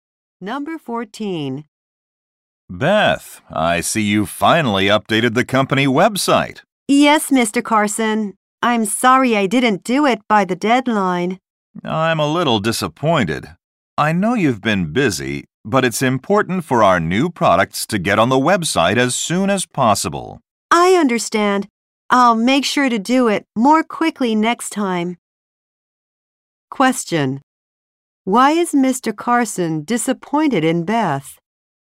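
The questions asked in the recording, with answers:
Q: Why is Mr. Carson disappointed in Beth?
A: She didn't update the website by the deadline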